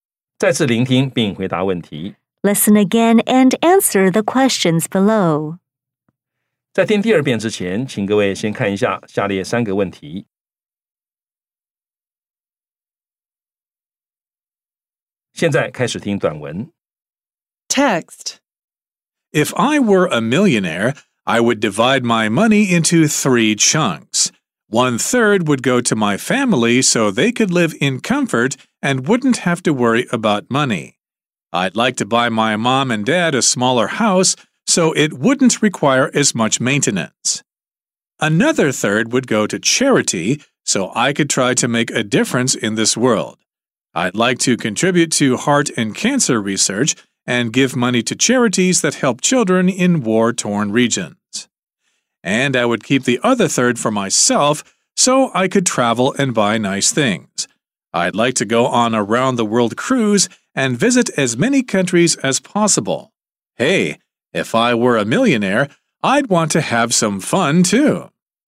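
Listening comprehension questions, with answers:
再次聆聽並回答問題 Listen again and answer the questions below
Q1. How many parts would the speaker divide the money into?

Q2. Where would the speaker like to contribute the money to?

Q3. What does the speaker plan to do with the last part of the money?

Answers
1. Three parts.
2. To heart and cancer research and to charities that help children in war-torn regions.
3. Keep it to travel and buy nice things, such as a round-the-world cruise.

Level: 中級口語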